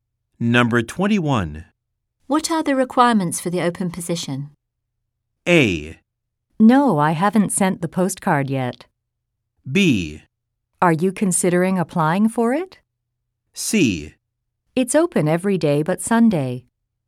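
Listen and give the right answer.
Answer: B: Are you considering applying for it?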